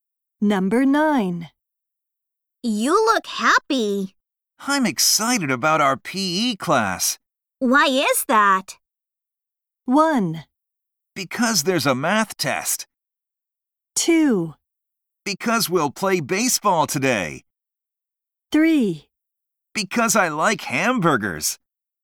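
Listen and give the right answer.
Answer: 2: Because we'll play baseball today.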